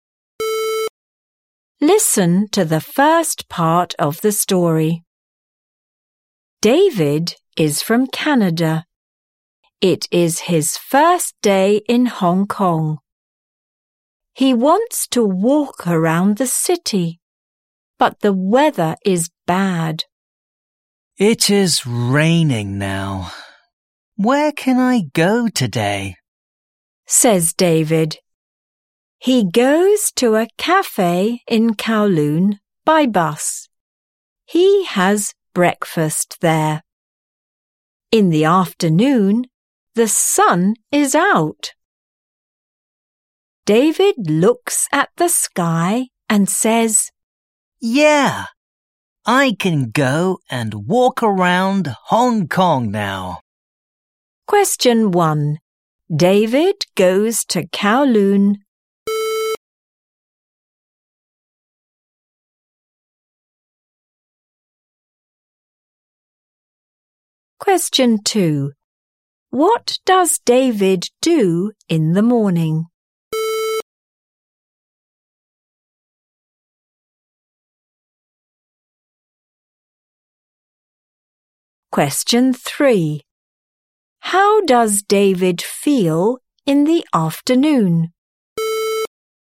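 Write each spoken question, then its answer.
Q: David goes to Kowloon.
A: by bus

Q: What does David do in the morning?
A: He has breakfast at a cafe in Kowloon.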